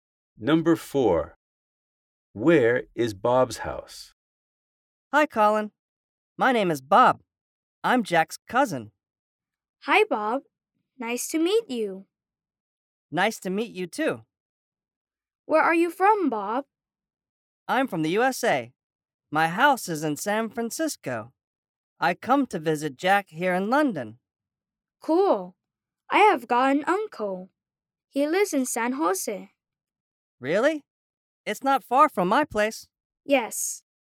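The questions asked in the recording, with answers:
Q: Where is Bob's house?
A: In San Francisco, the USA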